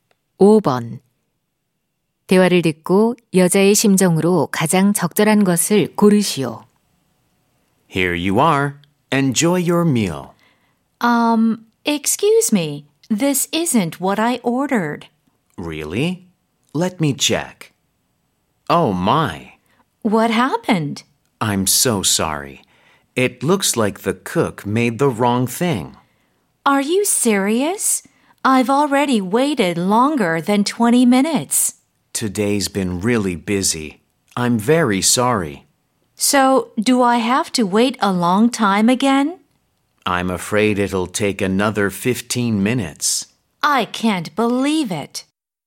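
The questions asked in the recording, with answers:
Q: 대화를 듣고 여자의 심정으로 가장 적절한 것을 고르시오.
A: 짜증남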